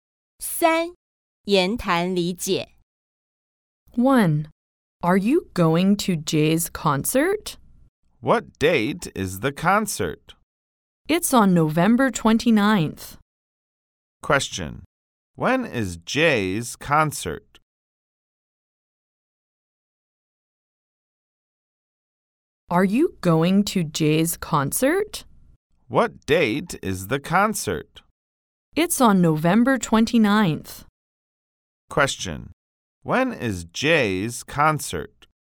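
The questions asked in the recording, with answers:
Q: When is Jay's concert?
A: On November 29th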